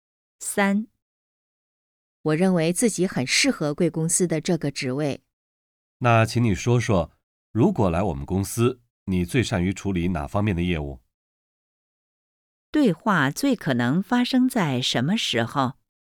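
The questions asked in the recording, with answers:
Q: 对话最可能发生在什么时候?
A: 面试的时候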